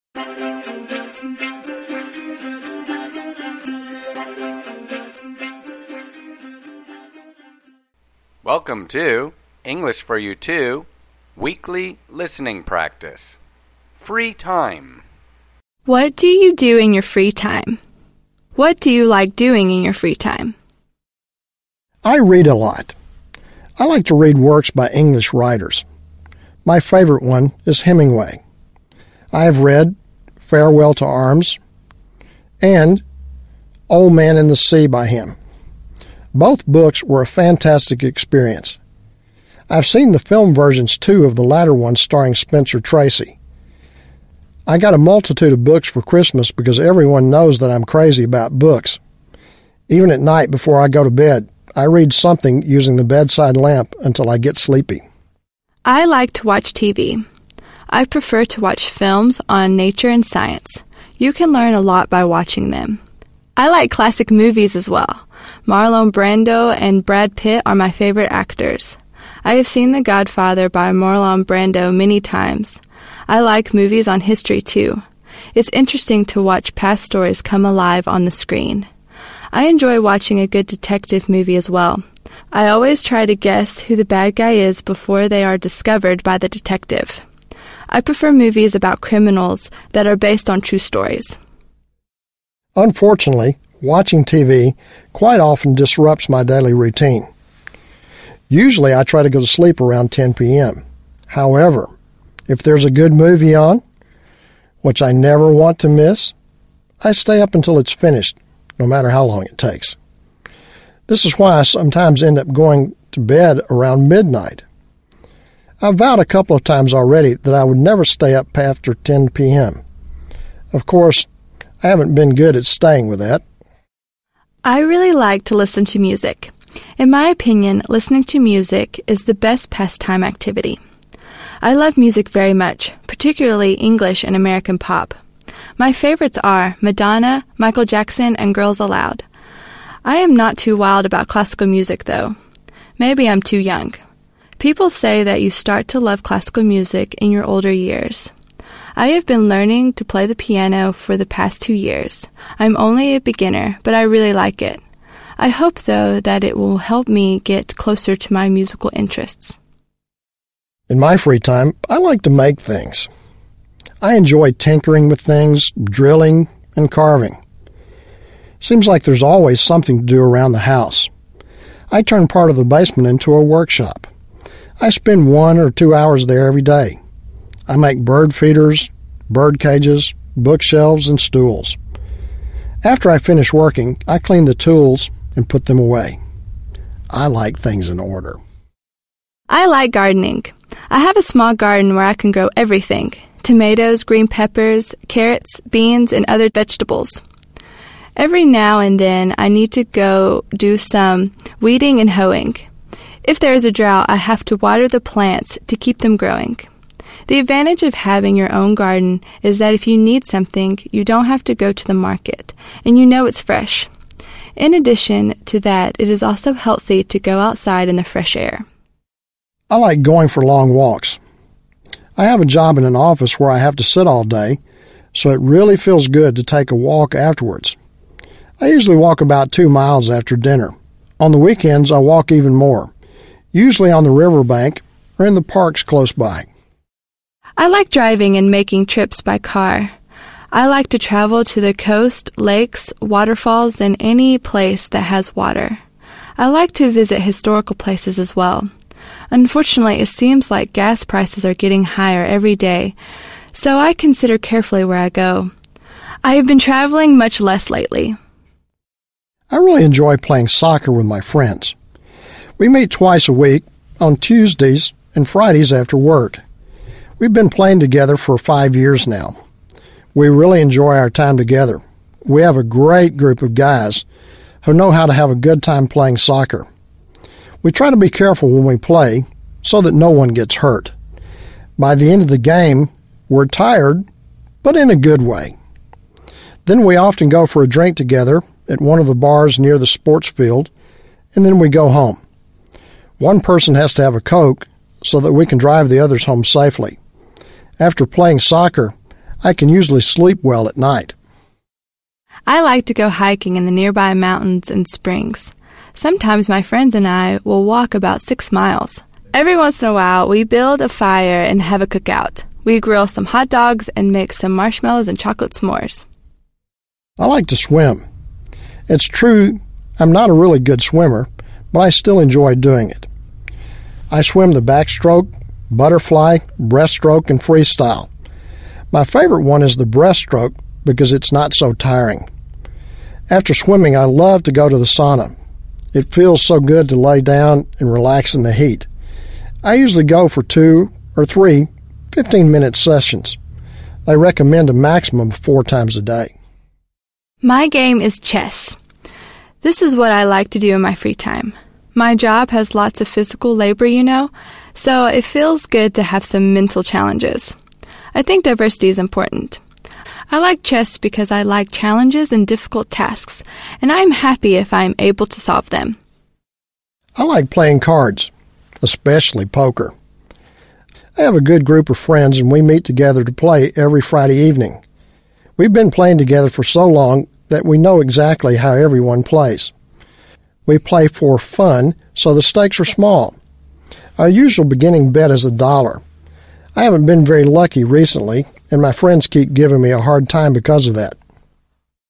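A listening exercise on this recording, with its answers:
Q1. What does the first speaker like to do in his free time?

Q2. Who are the second speaker's favorite actors?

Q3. What is – unfortunate – about watching TV?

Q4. What is the speaker NOT – good at?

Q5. What is the music lover NOT – too wild about?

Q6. What does the garden enthusiast claim is – the advantage of having your own garden?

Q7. Why does the car enthusiast need to - consider carefully where to go?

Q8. Why does one of the soccer player's friends - have to drink coke?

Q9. Where does the swimmer – love to go after swimming?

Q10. What does the card player mean by – the stakes are small?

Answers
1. Read, especially works by English writers
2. Marlon Brando and Brad Pitt
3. It often disrupts the speaker's daily routine
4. Keeping the vow never to stay up after 10 p.m.
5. Classical music
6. You don't have to go to the market, and you know it's fresh
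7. Gas prices are getting higher every day
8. So he can drive the others home safely
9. To the sauna
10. They play for fun with small bets; the usual beginning bet is $1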